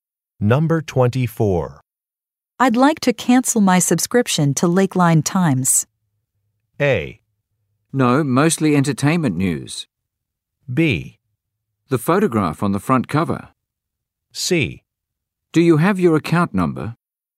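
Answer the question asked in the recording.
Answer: C: Do you have your account number?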